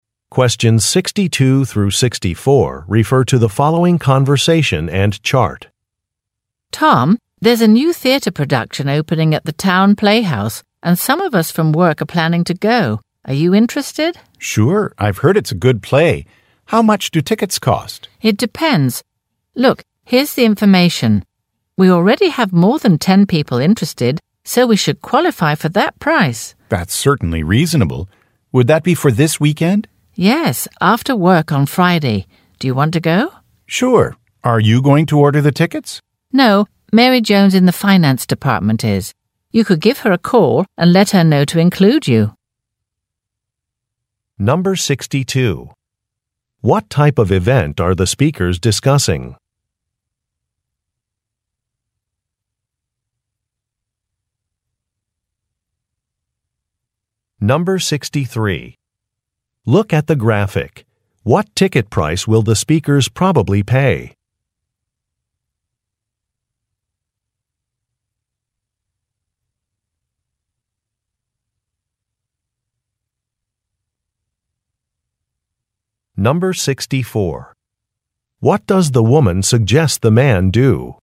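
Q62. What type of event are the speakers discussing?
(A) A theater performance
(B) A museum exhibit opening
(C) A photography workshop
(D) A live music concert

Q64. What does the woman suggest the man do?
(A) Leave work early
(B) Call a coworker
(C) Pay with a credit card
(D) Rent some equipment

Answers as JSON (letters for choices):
{"62": "A", "64": "B"}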